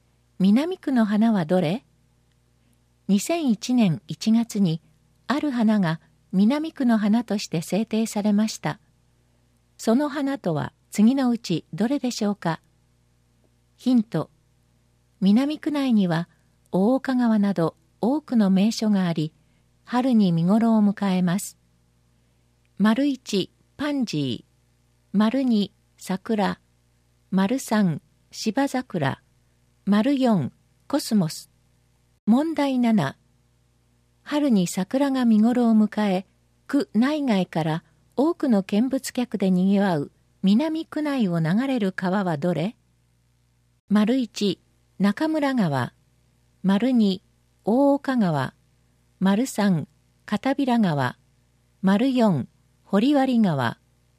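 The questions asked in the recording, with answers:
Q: 南区の花はどれ?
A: 2: 桜

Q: 春に桜が見ごろを迎え、区内外から多くの見物客でにぎわう南区内を流れる川はどれ?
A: 2: 大岡川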